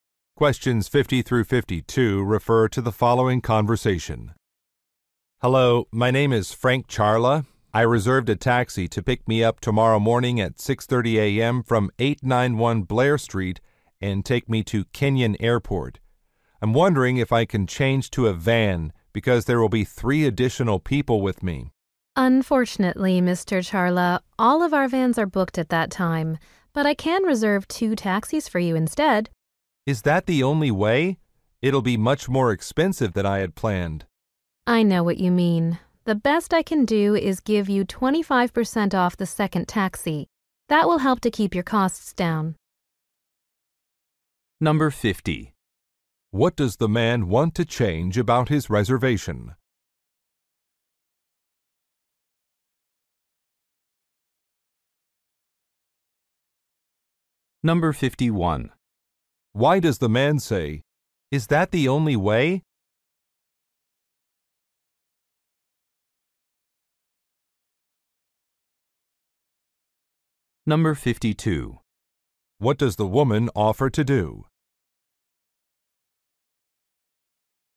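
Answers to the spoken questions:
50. Change from a taxi to a van
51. He is worried about the higher cost
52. Give him 25% off the second taxi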